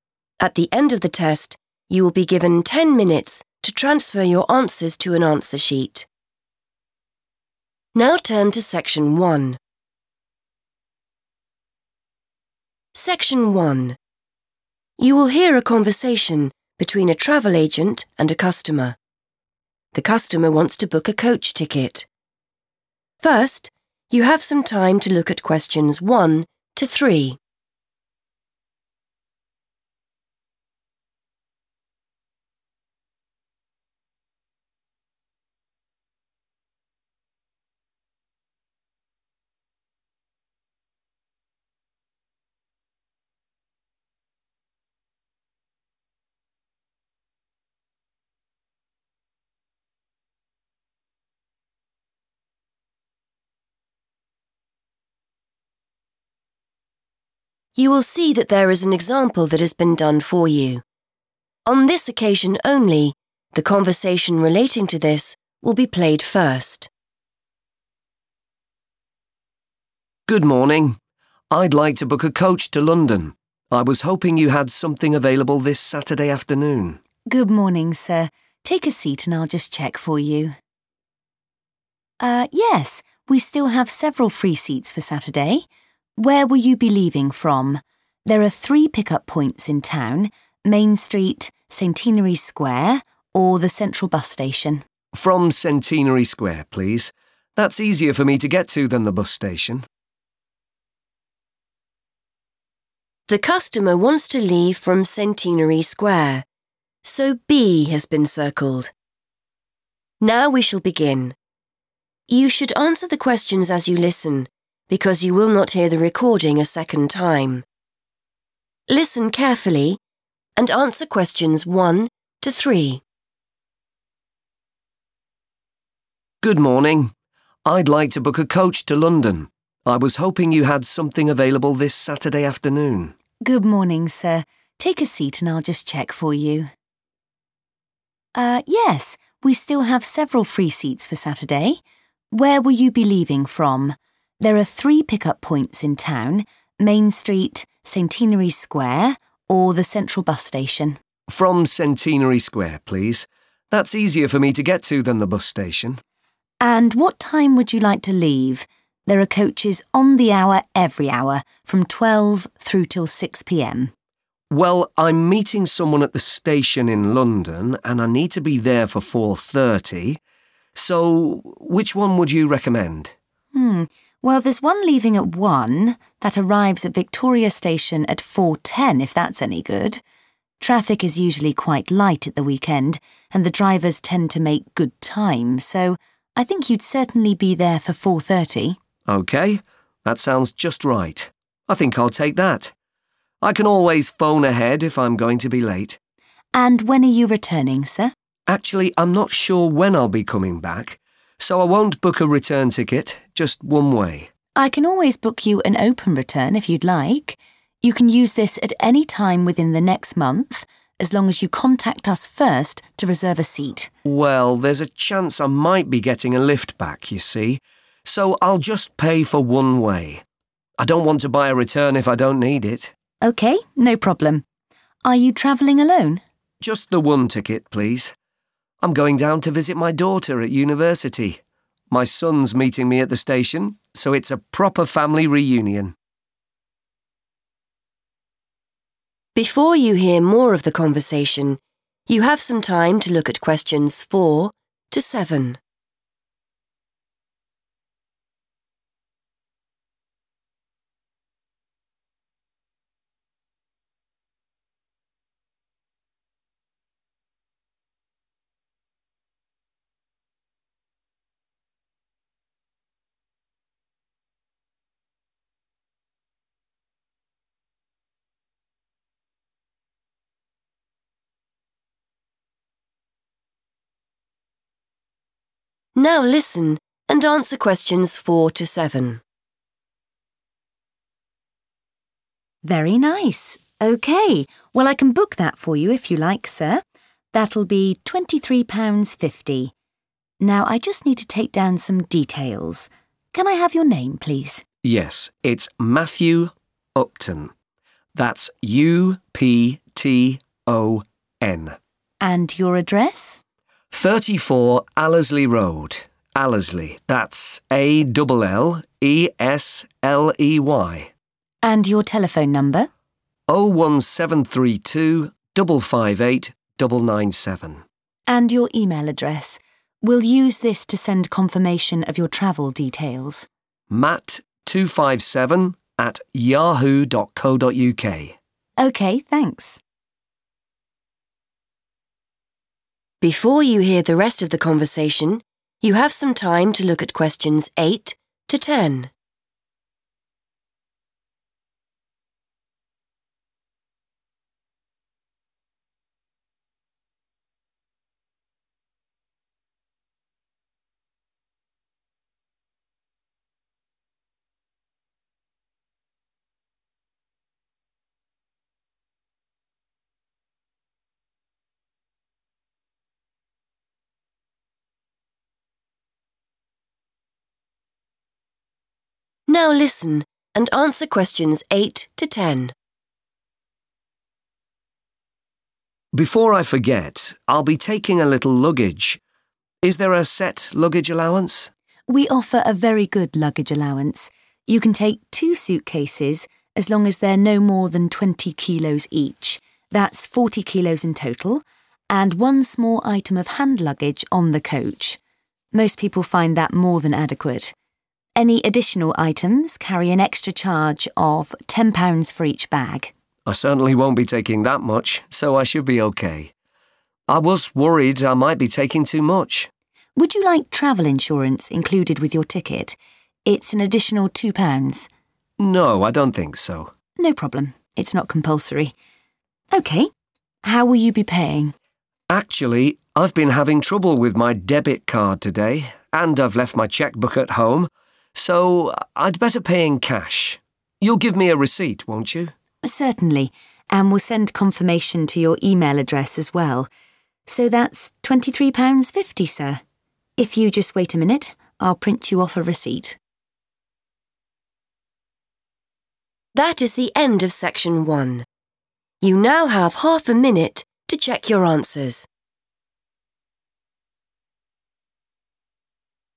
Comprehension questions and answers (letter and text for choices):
Choose the correct letter, A, B or C.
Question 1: The customer's coach departs at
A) 1.00 p.m.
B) 2.00 p.m.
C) 3.00 p.m.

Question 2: The customer wants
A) a single ticket.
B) a return ticket.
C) an open return ticket.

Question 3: The customer is going to London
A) to attend a family party.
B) to see his daughter.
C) for a meeting.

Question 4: Matthew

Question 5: 34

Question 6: 01732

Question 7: matt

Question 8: Apart from hand luggage, travellers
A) must pay £10 for luggage.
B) can only take two additional suitcases.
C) are allowed up to 40 kilos of luggage free of charge.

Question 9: Travel insurance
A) is included.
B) costs extra.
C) is compulsory.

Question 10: The customer decides to pay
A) by debit card.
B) in cash.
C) by cheque.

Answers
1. A) 1.00 p.m.
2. A) a single ticket.
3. B) to see his daughter.
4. Upton
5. Allesley Road
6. 558997
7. 257
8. C) are allowed up to 40 kilos of luggage free of charge.
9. B) costs extra.
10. B) in cash.

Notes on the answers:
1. The correct answer is A because the agent suggests the bus leaving at 1.00 p.m. Since this bus arrives at 4.10 p.m., it is the best choice for the man, who needs to be at the station by 4.30 p.m. The man agrees to this time by saying he will "take that." In this context, "leaving" is a synonym for "departs."
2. The correct answer is A because the traveler says he wants a "one way" ticket. In the world of travel, a "one way" ticket is also called a "single ticket." He does not want a "return ticket" because he might get a ride home from a friend or family member (getting a "lift"). He also rejects the offer for an "open return" ticket, which allows a person to choose their return date later, because he does not want to pay for a return trip he might not use.
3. The correct answer is B because the man clearly states his reason for travel while booking the ticket. He says he is going to 'visit' his daughter, who is a student at a 'university' in London. He also mentions meeting his son there for a 'family reunion.' Option A is incorrect because he does not mention a 'party,' and option C is incorrect because he is meeting his son, not a business meeting.
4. The correct answer is Upton because when the travel agent asks for the customer's name, he says 'Matthew Upton' and explains how to spell the last name letter by letter. This confirms that 'Upton' is the specific name needed to complete the form.
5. The correct answer is "Allesley Road" because the agent asks the customer for his address, and the customer says "34 Allesley Road." By matching the number "34" already in the notes, we can identify that "Allesley Road" is the missing part of the address.
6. The correct answer is 558997 because the agent asks for a phone number, and this is the specific number provided by the customer. Since the first part of the number (01732) is already written in the form, you only need to write the remaining digits mentioned in the conversation. Keywords to listen for are 'telephone number' and the start of the digits.
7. The correct answer is 257 because when the agent asks for an email address to send travel details, the customer says 'matt257@yahoo.co.uk'. The note already has 'matt' and '@yahoo.co.uk', so only the number 257 is needed to complete it.
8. The correct answer is C because the bus agent describes a "luggage allowance," which is the amount of baggage you are permitted to bring for free. He explains that a person can bring two suitcases that weigh 20 kilos each, which equals a total of 40 kilos. You only have to pay £10 if you bring more bags than this allowed amount.
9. The correct answer is B because the travel agent uses the word 'additional' when talking about the insurance price. In English, 'additional' is a synonym for 'extra.' This means the insurance is not included in the standard price of £23.50. The agent also confirms it is 'not compulsory,' meaning you are not forced to buy it, which makes choice C incorrect.
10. The correct answer is B because the customer explains that he cannot use his bank card (debit card) and he does not have his book for writing checks (cheque book) with him. Because of these reasons, he decides to use physical money, saying he will 'pay in cash'.

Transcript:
Customer: Good morning. I'd like to book a coach to London. I was hoping you had something available this Saturday afternoon.
Agent: Good morning, sir. Take a seat and I'll just check for you. Er, yes, we still have several free seats for Saturday. Where will you be leaving from? There are three pick-up points in town: Main Street, Centenary Square or the Central Bus Station.
Customer: From Centenary Square, please. That's easier for me to get to than the bus station.
Agent: And what time would you like to leave? There are coaches on the hour, every hour, from 12.00 through till 6.00 p.m.
Customer: Well, I'm meeting someone at the station in London and I need to be there for 4.30, so which one would you recommend?
Agent: Um, well, there's one leaving at 1.00. That arrives at Victoria Station at 4.10, if that's any good. Traffic is usually quite light at the weekend and the drivers tend to make good time, so I think you'd certainly be there for 4.30.
Customer: OK, that sounds just right. I think I'll take that. I can always phone ahead if I'm going to be late.
Agent: And when are you returning, sir?
Customer: Actually, I'm not sure when I'll be coming back, so I won't book a return ticket, just one way.
Agent: I can always book you an open return if you'd like. You can use this at any time within the next month as long as you contact us first to reserve a seat.
Customer: Well, there's a chance I might be getting a lift back, you see, so I'll just pay for one way. I don't want to buy a return if I don't need it.
Agent: OK, no problem. Are you travelling alone?
Customer: Just the one ticket, please. I'm going down to visit my daughter at university. My son's meeting me at the station, so it's a proper family reunion.
Agent: Very nice! OK. Well, I can book that for you if you like, sir. That'll be £23.50. Now, I just need to take down some details. Can I have your name, please?
Customer: Yes, it's Matthew Upton, that's U-P-T-O-N.
Agent: And your address?
Customer: 34 Allesley Road. Allesley, that's A-double L-E-S-L-E-Y.
Agent: And your telephone number?
Agent: And your email address. We'll use this to send confirmation of your travel details.
Customer: matt257@yahoo.co.uk.
Agent: OK, thanks.
Customer: Before I forget, I'll be taking a little luggage. Is there a set luggage allowance?
Agent: We offer a very good luggage allowance. You can take two suitcases as long as they're no more than 20 kilos each; that's 40 kilos in total, and one small item of hand luggage on the coach. Most people find that more than adequate. Any additional items carry an extra charge of £10 for each bag.
Customer: I certainly won't be taking that much, so I should be OK. I was worried I might be taking too much.
Agent: Would you like travel insurance included with your ticket? It's an additional £2.00.
Customer: No, I don't think so.
Agent: No problem, it's not compulsory. OK, how will you be paying?
Customer: Actually, I've been having trouble with my debit card today and I've left my cheque book at home, so I'd better pay in cash. You'll give me a receipt, won't you?
Agent: Certainly, and we'll send confirmation to your email address as well. So, that's £23.50, sir. If you just wait a minute, I'll print you off a receipt.